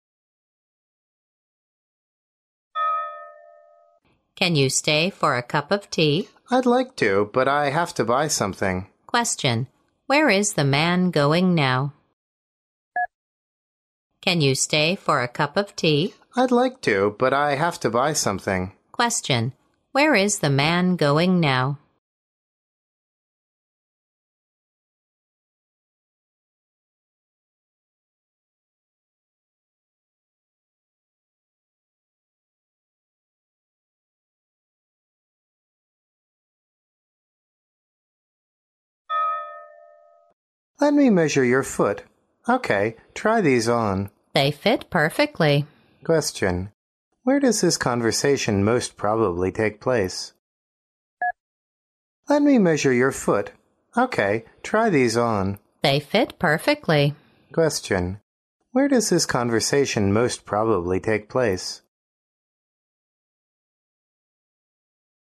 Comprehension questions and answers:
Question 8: Where is the man going now?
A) To the school.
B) To the shop.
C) To his friend's home.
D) To the hospital.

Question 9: Where does this conversation most probably take place?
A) In a supermarket.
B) In a grocery.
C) In a tailor's.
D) In a shoe store.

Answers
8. B
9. D

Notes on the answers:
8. 题目的意思是"男士要去哪?"男士说要去买点儿东西,所以应该是去商店。故答案为B。
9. M: Let me measure your foot. OK, try these on. W: They fit perfectly. Q: Where does this conversation most probably take place?

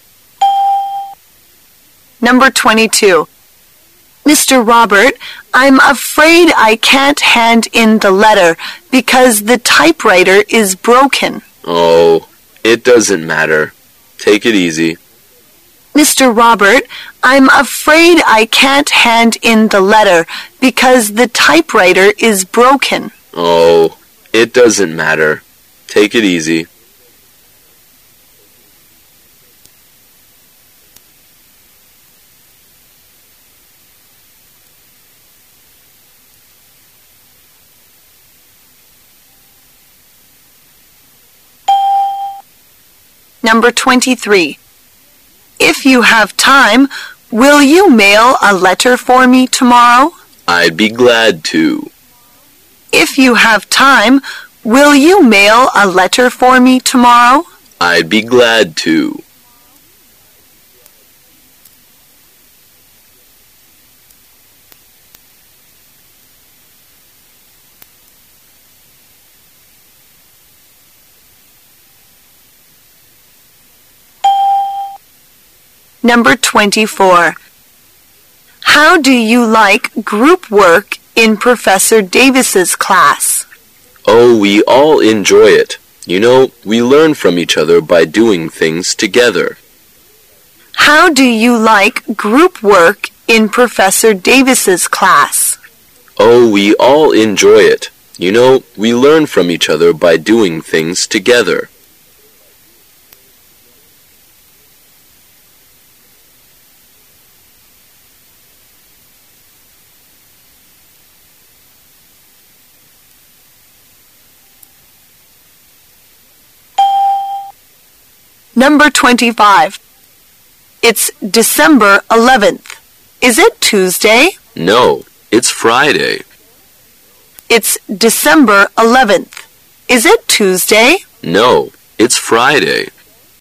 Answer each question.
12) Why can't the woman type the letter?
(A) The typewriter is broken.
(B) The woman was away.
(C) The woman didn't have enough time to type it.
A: A

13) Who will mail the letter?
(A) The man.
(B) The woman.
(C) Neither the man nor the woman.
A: A

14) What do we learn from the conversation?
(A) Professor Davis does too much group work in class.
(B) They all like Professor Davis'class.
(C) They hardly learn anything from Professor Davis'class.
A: B

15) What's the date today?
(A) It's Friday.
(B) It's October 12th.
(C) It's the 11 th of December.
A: C

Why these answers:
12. [解析] 根据对话内容,女:"...the typewriter is broken."可知打字机坏了。故本题答案为A。 [听力原文] W: Mr. Robert, I'm afraid I can't hand in the letter because the typewriter is broken. M: Oh, it doesn't matter. Take it easy.
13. [解析] I'd be glad to是"我愿意"的意思。根据对话内容,男:"I'd be glad to."可以推断出该男士将发邮件。故本题答案为A。 [听力原文] W: If you have time, will you mail a letter for me tomorrow? M: I'd be glad to.
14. [解析] 根据对话内容:"...we all enjoy it."可以推断出他们喜欢Davis教授的课。故本题答案为B。 [听力原文] W: How do you like group work in Professor Davis'class? M: Oh, we all enjoy it. You know, we learn from each other by doing things together.
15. [解析] 女:"今天是12月11号。是星期二吗?"男:"不是。是星期五。"所提的问题是今天是几号,不是星期几。故本题答案为C。 [听力原文] W: It's December 11 th. Is it Tuesday? M: No. It's Friday.

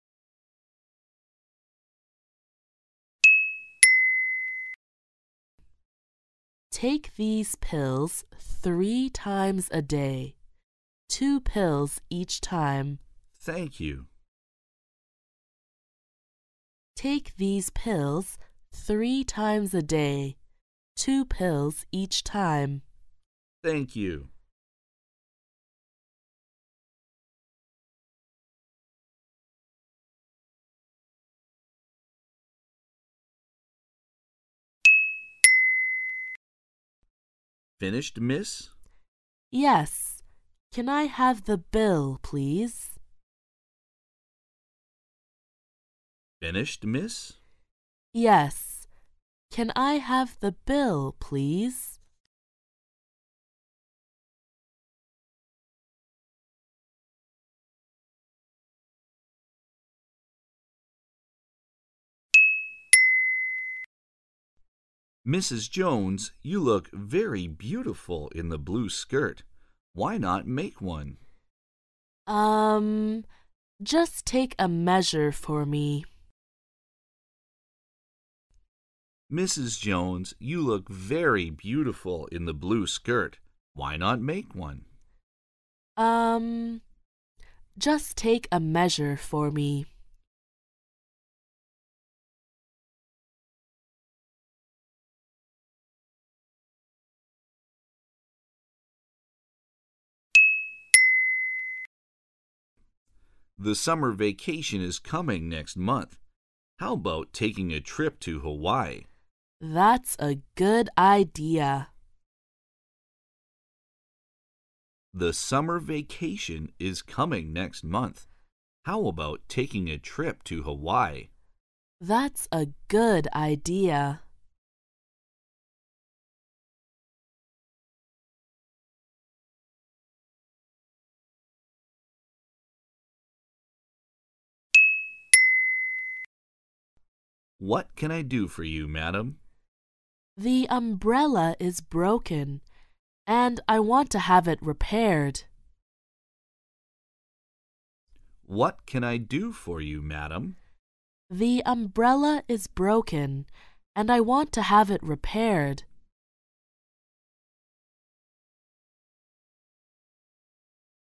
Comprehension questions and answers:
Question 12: What does the woman mean?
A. She wants the man to buy it.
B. She wants to buy it.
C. She doesn't want to buy it.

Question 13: What is the woman going to do?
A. She is going to make a blue skirt.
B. She is not going to make a blue skirt.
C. She is not going to do anything.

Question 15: What does the woman want the man to do?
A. She wants the man to buy an umbrella.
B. She wants the man to repair her umbrella.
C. She wants the man to repair her window.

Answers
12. B
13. A
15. B

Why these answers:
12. M: Finished, Miss? W: Yes, can I have the bill, please? Q: What does the woman mean?
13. M: Mrs. Jones, you look very beautiful in the blue skirt, why not make one? W: Urn... just take a measure for me. Q: What is the woman going to do?
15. M: What can I do for you, Madam? W: The umbrella is broken, and I want to have it repaired. Q: What does the woman want the man to do?

